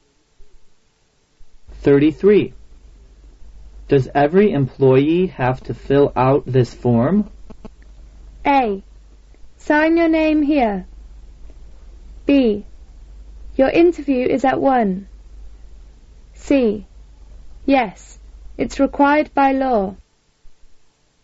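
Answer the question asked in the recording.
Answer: C: Yes, it's required by law.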